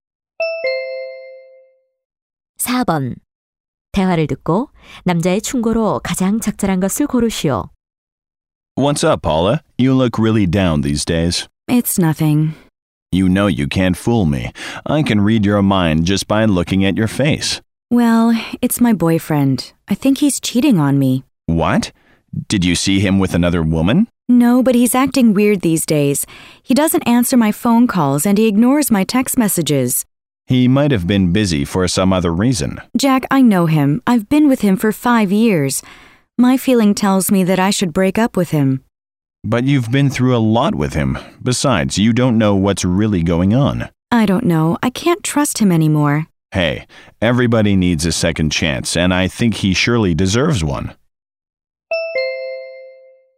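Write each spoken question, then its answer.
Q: 대화를 듣고 남자의 충고로 가장 적절한 것을 고르시오.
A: 남자친구에게 한 번 더 기회를 주라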